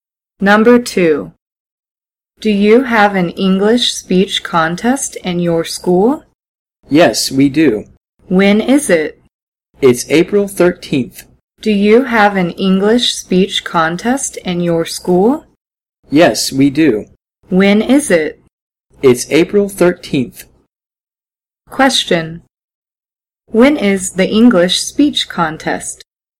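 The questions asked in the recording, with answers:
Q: When is the English speech contest?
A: April 13th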